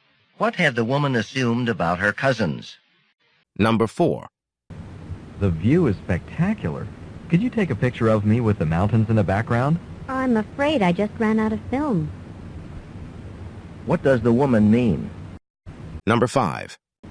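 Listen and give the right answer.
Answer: She can't take the picture because she has no film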